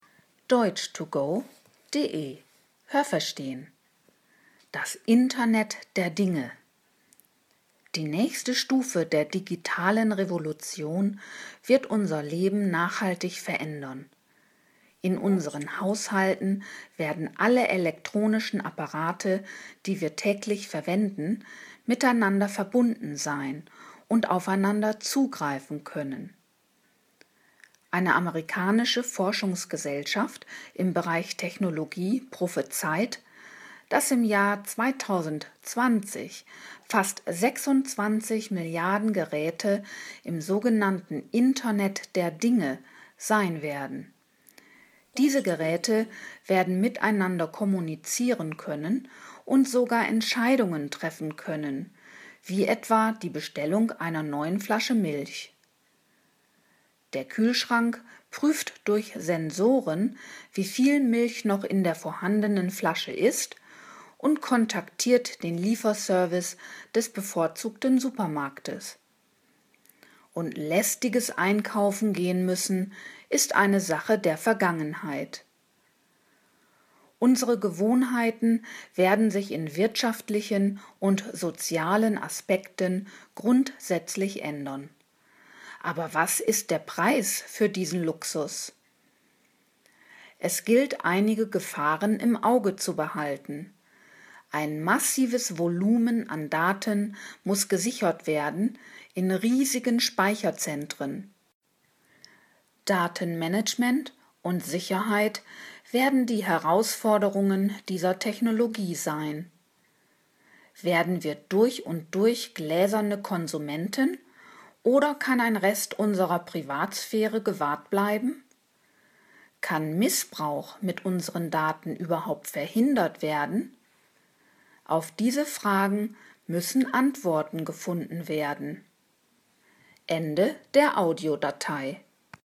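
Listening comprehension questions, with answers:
Haben Sie das gehört? Stimmt diese Aussage?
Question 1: In unseren Haushalten werden in Zukunft elektronische Geräte digital miteinander verbunden sein.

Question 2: Im Jahr 2200 werden 26 Milliarden Geräte im Internet der Dinge sein.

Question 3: Die Geräte werden dann auch Milch produzieren können.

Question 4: Kühlschränke können über Sensoren die vorhandene Menge eines Produktes, wie etwa den Inhalt einer Flasche Milch, messen.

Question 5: Man wird nicht mehr unbedingt in den Supermarkt zum Einkaufen gehen müssen.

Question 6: Das Internet der Dinge birgt keinerlei Gefahren.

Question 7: Es ist heute noch nicht absehbar, ob unsere Privatsphäre gewahrt bleiben kann.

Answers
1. Richtig
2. Falsch
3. Falsch
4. Richtig
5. Richtig
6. Falsch
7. Richtig

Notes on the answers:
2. Dies wird schon für das Jahr 2020 prophezeit.
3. Sie werden in der Lage sein, Milch zu bestellen.
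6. Es werden große Datenmengen zu managen sein. Diese Daten müssen gesichert werden.

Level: Hörtexte C (schwer)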